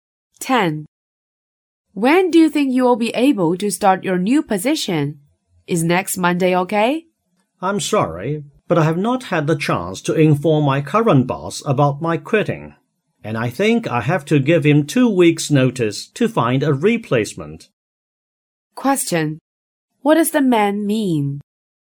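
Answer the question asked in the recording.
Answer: He can't start next Monday; he needs to give his boss two weeks' notice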